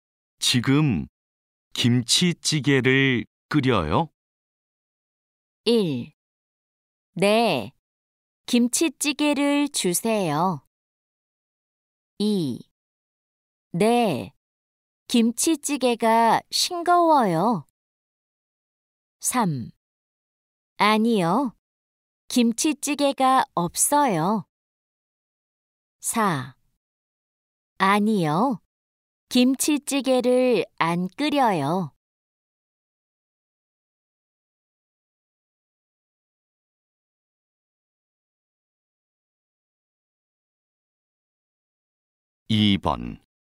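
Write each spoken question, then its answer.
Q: 지금 김치찌개를 끓여요?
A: 4: 아니요, 김치찌개를 안 끓여요.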